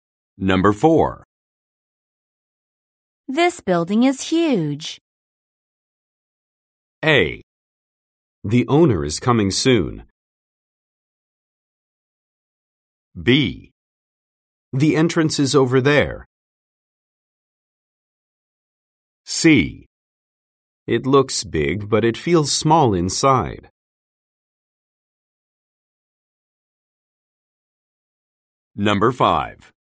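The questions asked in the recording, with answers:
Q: This building is huge.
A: C: It looks big, but it feels small inside.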